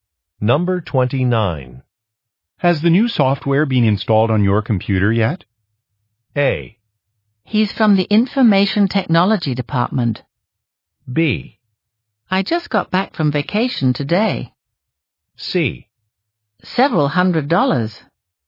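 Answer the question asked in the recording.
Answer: B: I just got back from vacation today.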